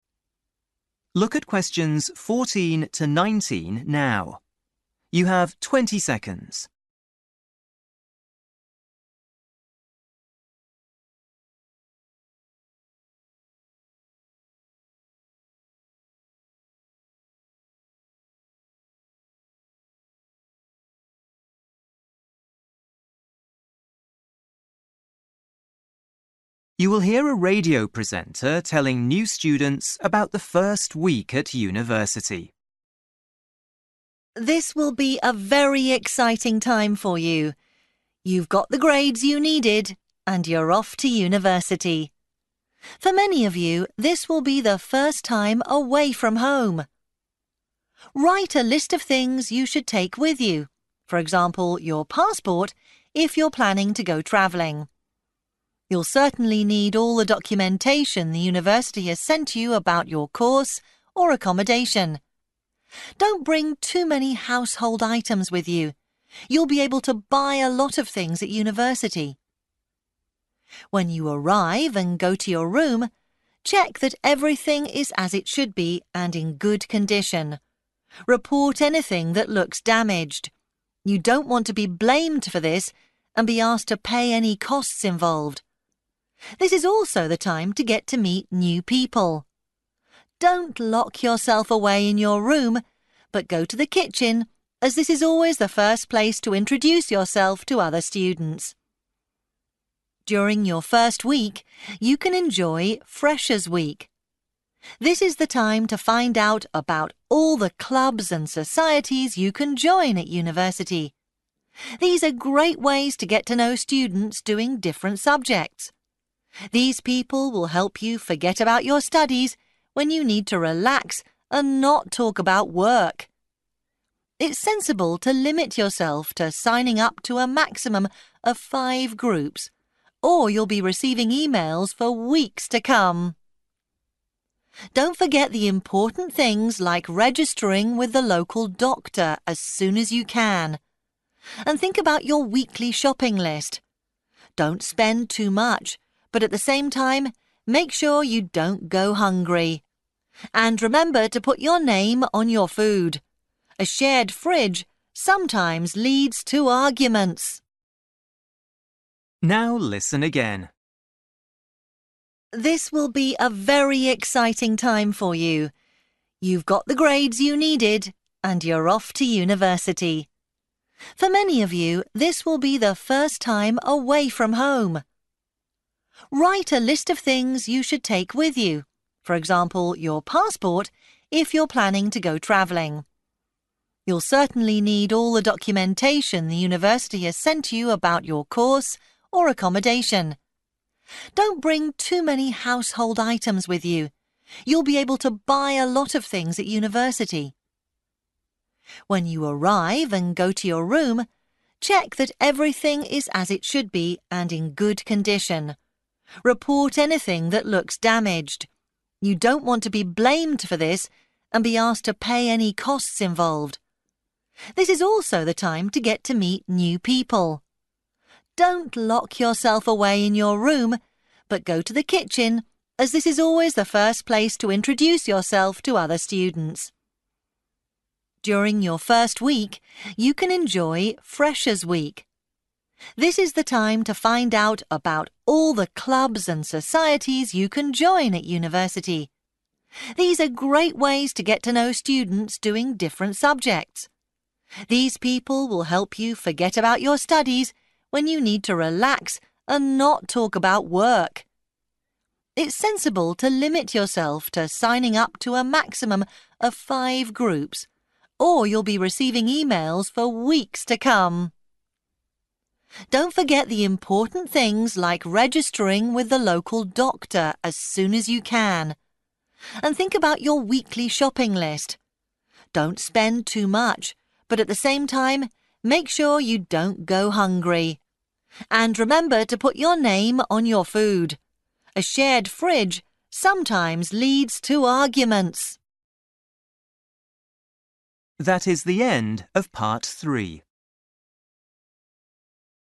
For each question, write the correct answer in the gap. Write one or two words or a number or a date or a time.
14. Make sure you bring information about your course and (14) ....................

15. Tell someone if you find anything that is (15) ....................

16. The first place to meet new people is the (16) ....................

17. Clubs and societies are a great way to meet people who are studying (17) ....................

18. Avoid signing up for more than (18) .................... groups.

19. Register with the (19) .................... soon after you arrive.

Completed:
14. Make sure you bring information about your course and accommodation
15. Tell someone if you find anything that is damaged
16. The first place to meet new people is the kitchen
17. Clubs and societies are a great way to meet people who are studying different subjects
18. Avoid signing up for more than five/5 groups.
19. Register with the local doctor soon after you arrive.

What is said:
Woman: This will be a very exciting time for you. You've got the grades you needed and you're off to university. For many of you this will be the first time away from home. Write a list of things you should take with you, for example, your passport if you're planning to go travelling. You'll certainly need all the documentation the university has sent you about your course or accommodation. Don't bring too many household items with you. You'll be able to buy a lot of things at university.
When you arrive and go to your room, check that everything is as it should be and in good condition. Report anything that looks damaged. You don't want to be blamed for this and be asked to pay any costs involved. This is also the time to get to meet new people. Don't lock yourself away in your room, but go to the kitchen as this is always the first place to introduce yourself to other students.
During your first week you can enjoy Freshers· Week. This is the time to find out about all the clubs and societies you can join at university. These are great ways to get to know students doing different subjects. These people will help you forget about your studies when you need to relax and not talk about work. It's sensible to limit yourself to signing up to a maximum of five groups or you'll be receiving emails for weeks to come.
Don't forget the important things like registering with the local doctor as soon as you can. And think about your weekly shopping list. Don't spend too much but at the same time make sure you don't go hungry. And remember to put your name on your food. A shared fridge sometimes leads to arguments!

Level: PET (B1)